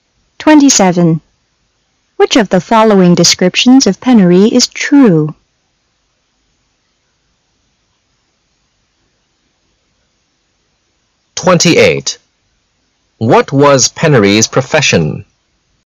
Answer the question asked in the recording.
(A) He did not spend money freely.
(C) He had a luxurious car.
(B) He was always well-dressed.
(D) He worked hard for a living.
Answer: (A) He did not spend money freely.